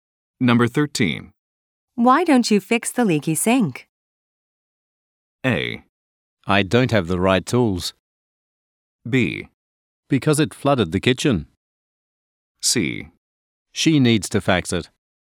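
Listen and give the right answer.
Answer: A: I don't have the right tools.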